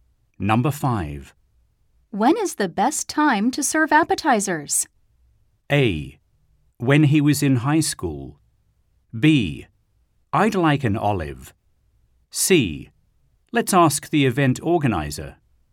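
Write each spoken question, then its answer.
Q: When is the best time to serve appetizers?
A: C: Let's ask the event organizer.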